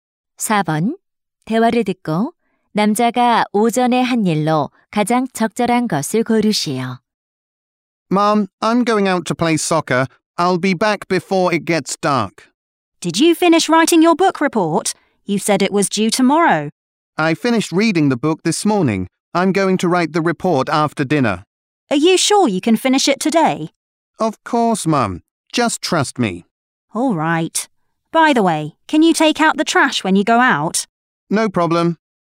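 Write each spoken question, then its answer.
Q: 대화를 듣고 남자가 오전에 한 일로 가장 적절한 것을 고르시오.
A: 책 읽기를 끝냄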